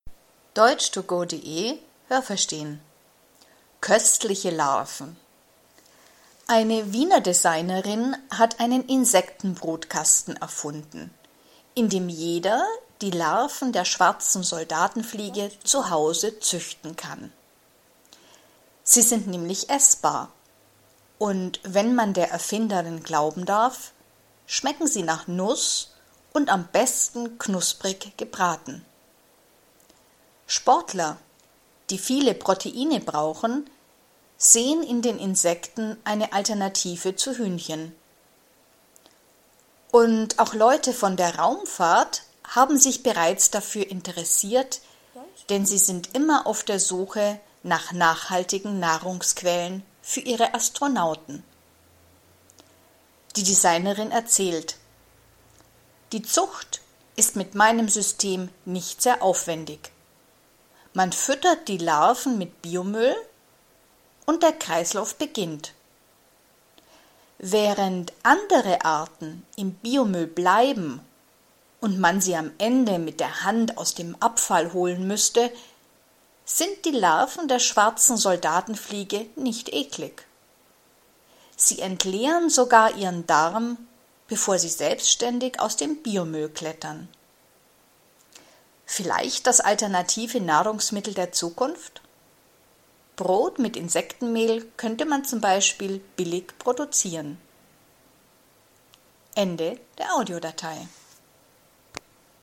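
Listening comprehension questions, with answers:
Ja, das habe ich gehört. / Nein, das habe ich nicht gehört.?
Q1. Nur Spezialisten können die Larven der schwarzen Soldatenfliegen züchten.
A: Nein, das habe ich nicht gehört.

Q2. Der Geschmack der schwarzen Soldatenfliege hat Ähnlichkeit mit dem Geschmack von Hühnchen.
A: Nein, das habe ich nicht gehört.

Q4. Sportler und Astronauten interessien sich für die Insekten als alternative Nahrungsquelle.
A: Ja, das habe ich gehört.

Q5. Die Larven der schwarzen Soldatenfliege ernähren sich von Biomüll.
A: Ja, das habe ich gehört.

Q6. Die Larven der schwarzen Soldatenfliege muss man am Ende mit den Händen aus dem Müll holen.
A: Nein, das habe ich nicht gehört.

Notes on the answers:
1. Jeder kann zu Hause solche Larven züchten.
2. Die Larven der schwarzen Soldatenfliege schmecken nach Nuss.
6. Die Larven der schwarzen Soldatenfliege klettern selbstständig aus dem Biomüll.

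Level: B2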